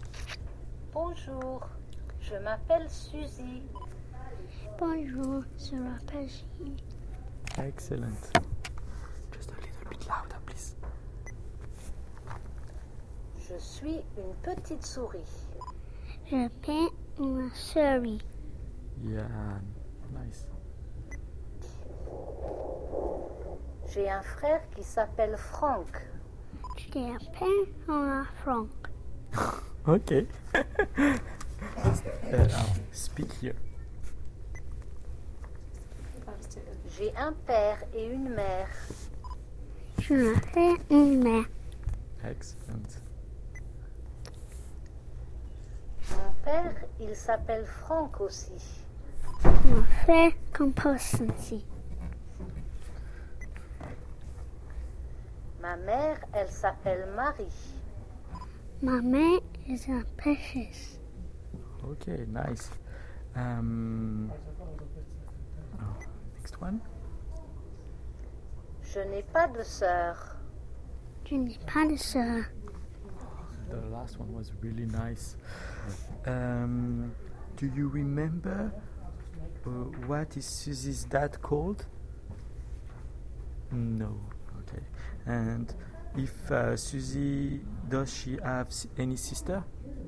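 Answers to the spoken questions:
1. Franck
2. No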